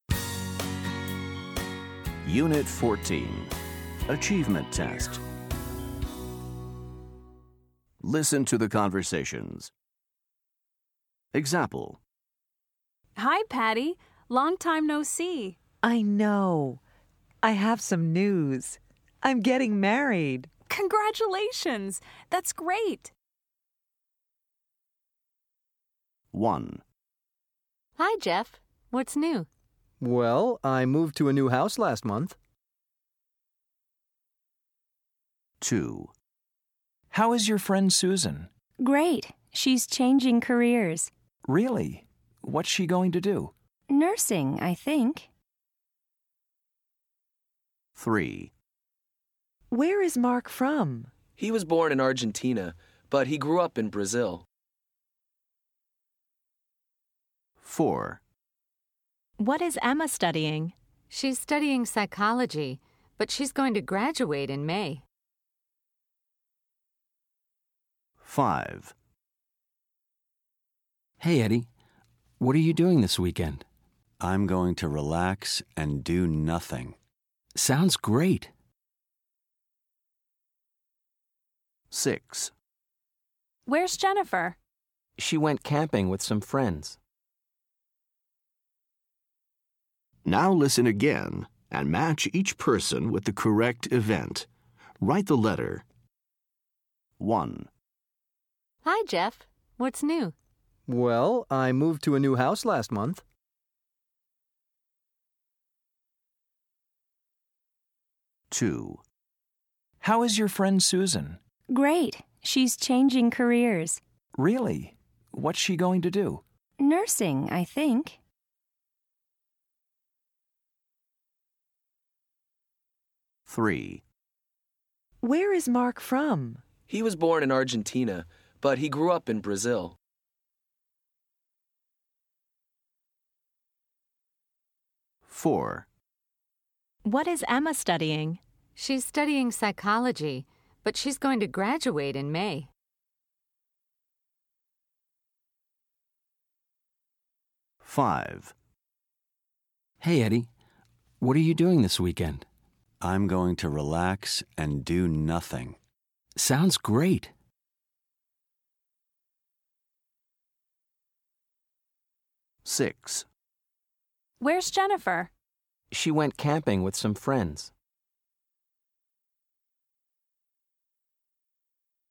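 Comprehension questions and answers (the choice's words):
Listen to the conversations. Then listen again and match each person with the correct event by dragging and dropping them into the blank fields.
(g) moved to a new house.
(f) is changing careers.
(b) grew up in Brazil.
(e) is going to graduate.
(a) is going to do nothing.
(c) went camping.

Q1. Jeff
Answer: moved to a new house.

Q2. Susan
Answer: is changing careers.

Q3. Mark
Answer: grew up in Brazil.

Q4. Emma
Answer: is going to graduate.

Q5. Eddie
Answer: is going to do nothing.

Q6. Jennifer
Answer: went camping.

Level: fundamentals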